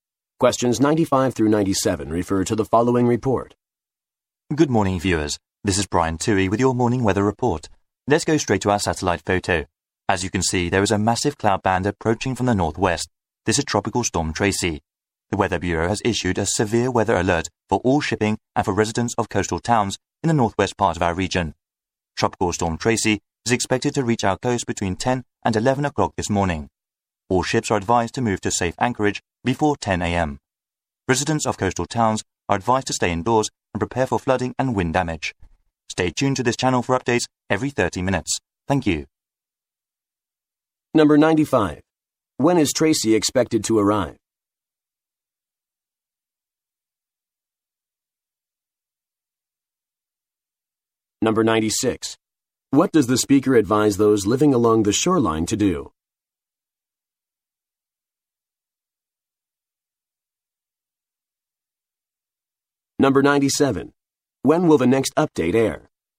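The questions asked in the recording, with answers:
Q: When is Tracy expected to arrive?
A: Between 10 and 11 o'clock this morning

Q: What does the speaker advise those living along the shoreline to do?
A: Stay indoors and prepare for flooding and wind damage

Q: When will the next update air?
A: In 30 minutes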